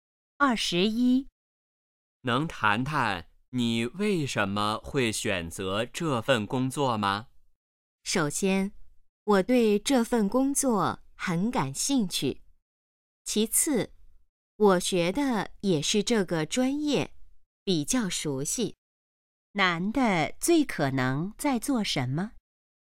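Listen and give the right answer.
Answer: 面试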